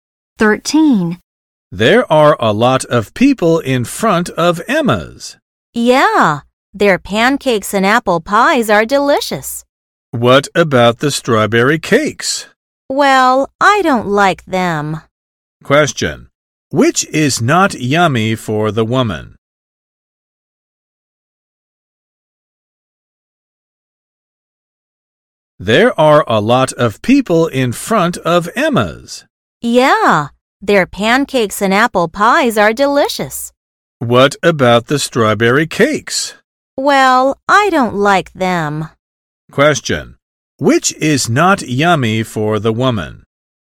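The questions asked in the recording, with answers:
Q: Which is not yummy for the woman?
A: The strawberry cakes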